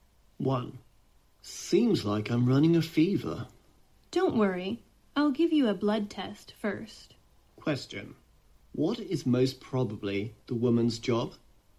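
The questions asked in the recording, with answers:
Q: What is most probably the woman's job?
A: A doctor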